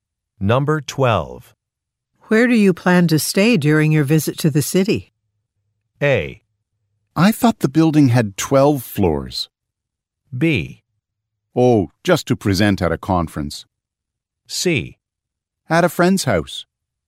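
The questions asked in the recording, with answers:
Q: Where do you plan to stay during your visit to the city?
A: C: At a friend's house.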